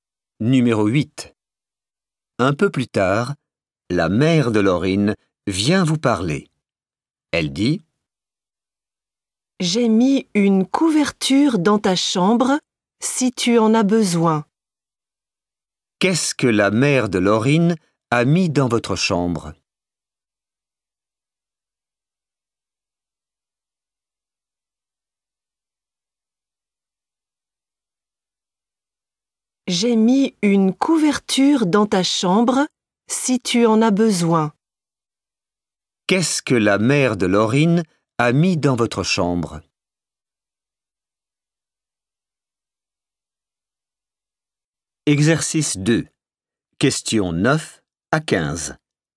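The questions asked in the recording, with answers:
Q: Qu'est-ce que la mère de Laurine a mis dans votre chambre?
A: une couverture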